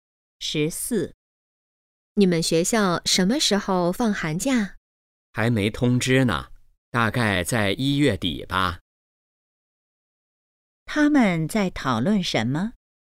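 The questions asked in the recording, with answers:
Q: 他们在讨论什么?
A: 放寒假的时间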